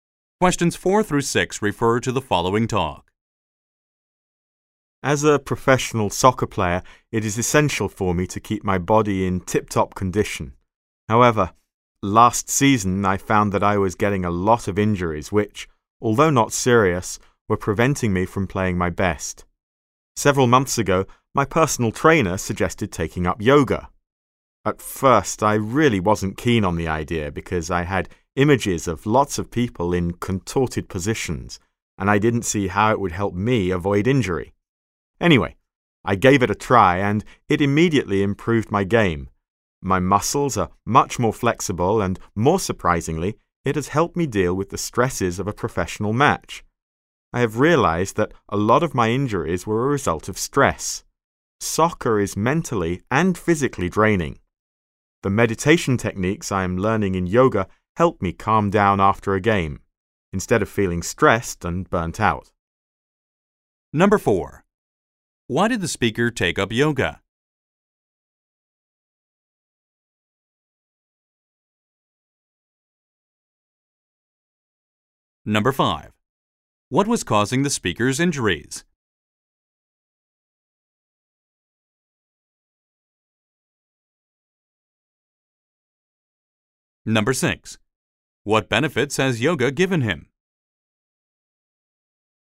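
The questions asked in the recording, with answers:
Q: Why did the speaker take up yoga?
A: His personal trainer suggested it, to stop getting injuries.

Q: What was causing the speaker's injuries?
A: Stress.

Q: What benefits has yoga given him?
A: More flexible muscles and help dealing with stress.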